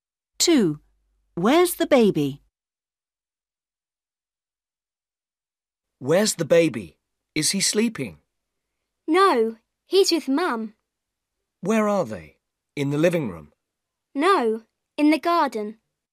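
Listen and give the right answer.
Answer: In the garden with Mum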